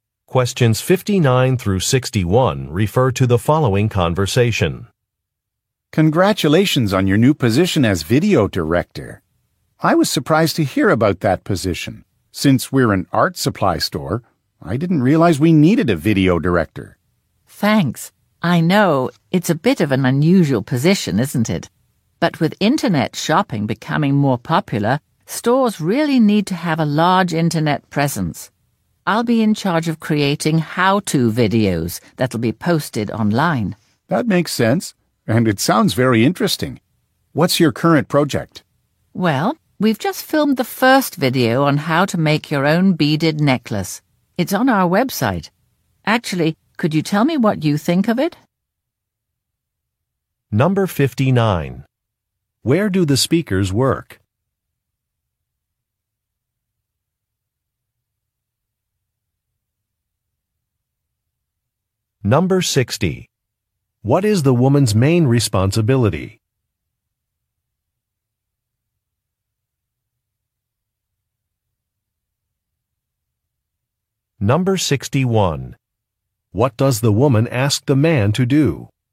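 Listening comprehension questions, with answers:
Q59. Where do the speakers work?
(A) At an art supply store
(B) At a movie theater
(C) At a technology company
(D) At a jewelry store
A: At an art supply store

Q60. What is the woman's main responsibility?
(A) Creating inventory lists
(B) Recruiting temporary help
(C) Making online videos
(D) Installing equipment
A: Making online videos

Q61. What does the woman ask the man to do?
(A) Edit a report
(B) Give some feedback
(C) Upload some pictures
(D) Open an account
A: Give some feedback

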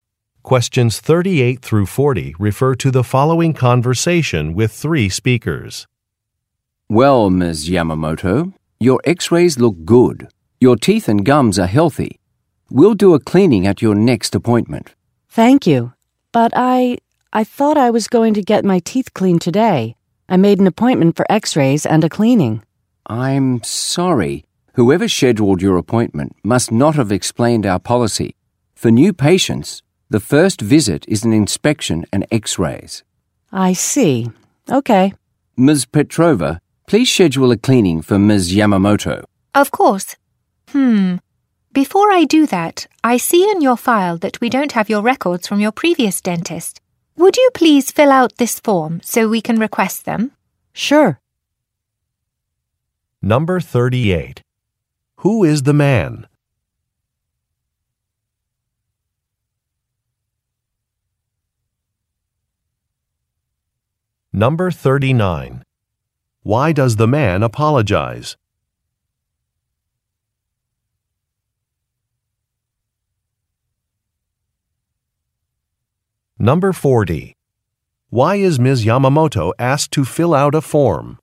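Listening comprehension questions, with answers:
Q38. Who is the man?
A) A lawyer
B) An electrician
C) A dentist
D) A banker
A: A dentist

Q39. Why does the man apologize?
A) Some documents are missing.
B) Some equipment is not working.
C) An assistant is late.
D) A policy was not explained.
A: A policy was not explained.

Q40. Why is Ms. Yamamoto asked to fill out a form?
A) To update her contact information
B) To set up a payment plan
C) To request some records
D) To opt for paperless statements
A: To request some records

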